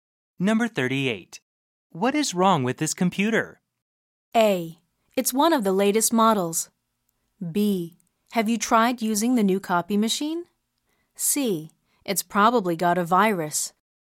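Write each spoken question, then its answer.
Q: What is wrong with this computer?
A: C: It's probably got a virus.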